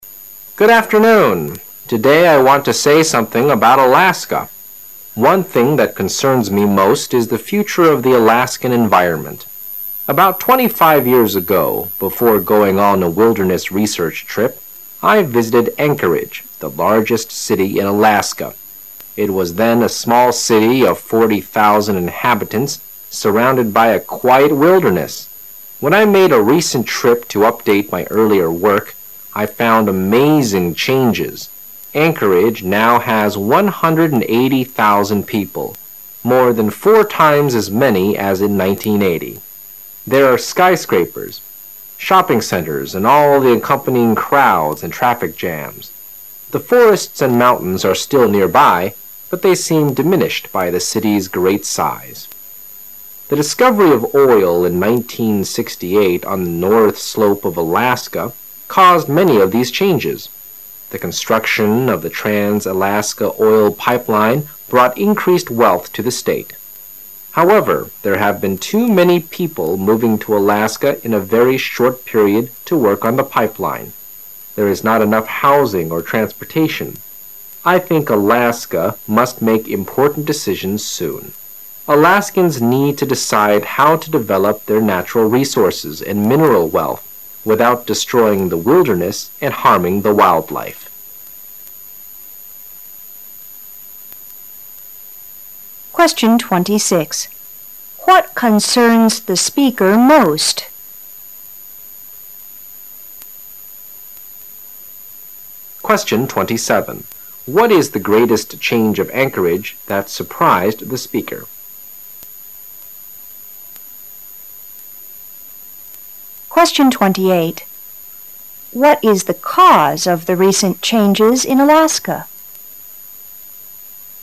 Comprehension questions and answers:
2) What is the greatest change of Anchorage that surprised the speaker?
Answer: A rapid rise in population.

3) What is the cause of the recent changes in Alaska?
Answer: The discovery of oil

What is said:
Today I want to say something about Alaska. One thing that concerns me most is the future of the Alaskan environment. About 25 years ago, before going on a wilderness research trip, I visited Anchorage, the largest city in Alaska. It was then a small city of 40,000 inhabitants surrounded by a quiet wilderness. When I made a recent trip to update my earlier work, I found amazing changes. Anchorage now has 180,000 people, more than four times as many as in 1980. There're skyscrapers, shopping centers and all the accompanying crowds and traffic jams. The forests and mountains are still nearby, but they seem diminished by the city's great size. The discovery of oil in 1968 on the north slope of Alaska caused many of these changes. The construction of the trans-Alaska oil pipeline brought increased wealth to the state. However, there have been too many people moving to Alaska in a very short period to work on the pipeline. There is not enough housing or transportation. I think Alaska must make important decisions soon. Alaskans need to decide how to develop their natural resources and mineral wealth without destroying the wilderness and harming the wildlife. 26.